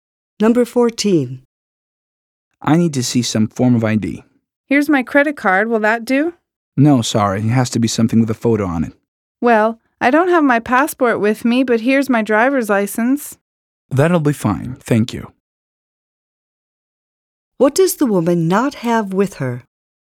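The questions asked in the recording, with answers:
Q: What does the woman not have with her?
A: Her passport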